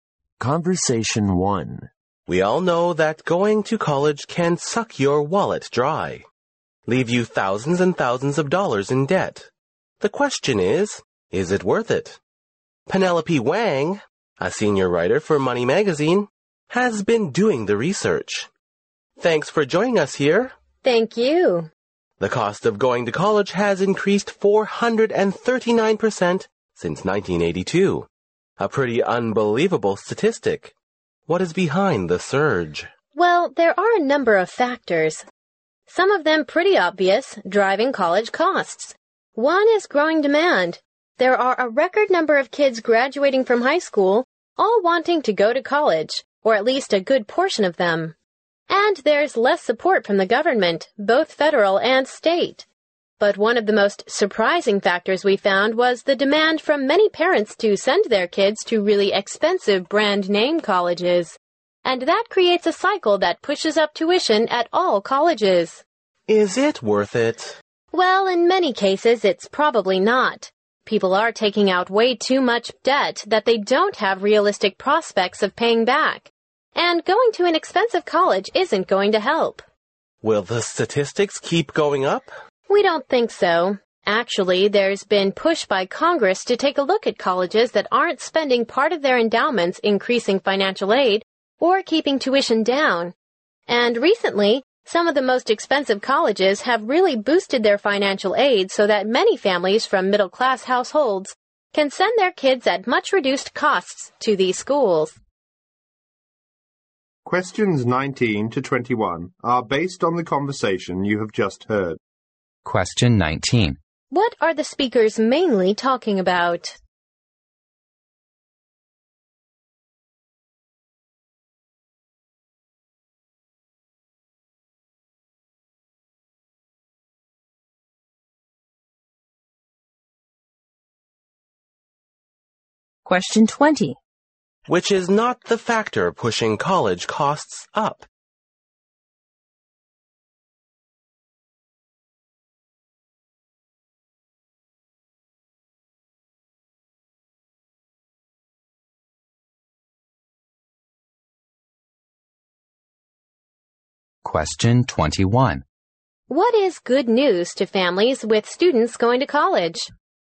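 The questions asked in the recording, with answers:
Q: What are the speakers mainly talking about?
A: Whether college is worth its rising cost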